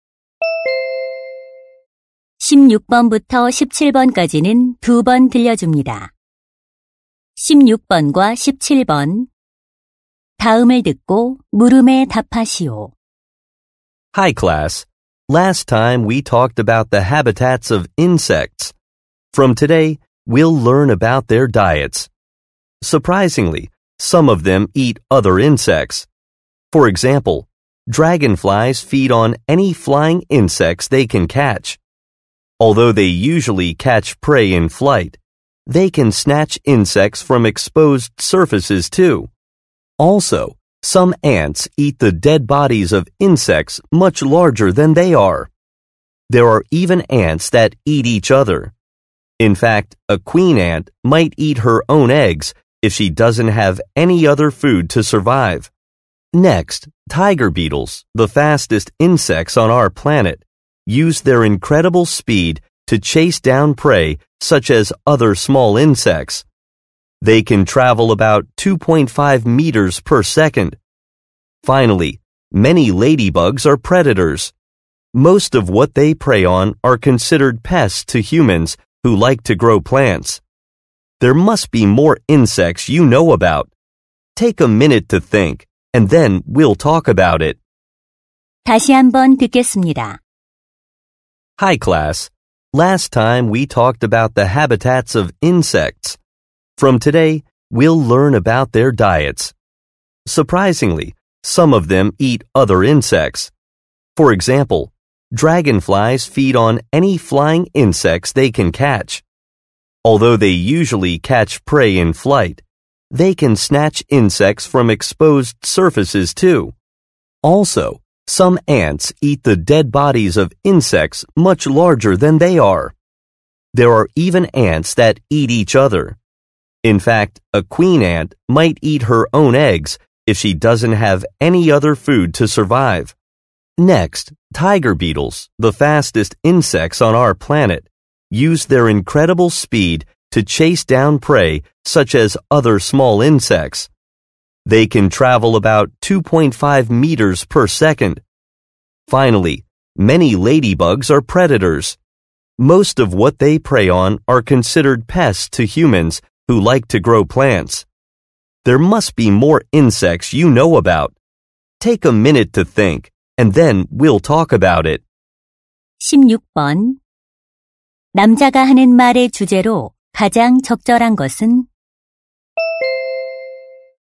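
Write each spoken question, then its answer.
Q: 남자가 하는 말의 주제로 가장 적절한 것은?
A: 다른 곤충을 잡아먹는 곤충들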